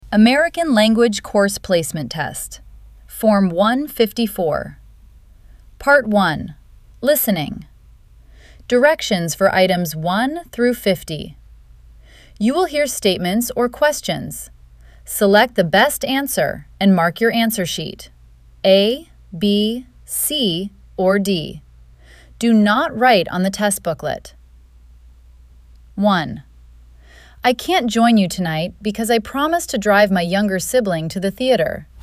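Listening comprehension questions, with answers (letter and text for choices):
I can't join you tonight because I promised to drive my younger sibling to the theater.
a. Go to the movies with the man.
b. Take her brother to the movies.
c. Eat at her brother's.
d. Cook dinner with Lois.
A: b. Take her brother to the movies.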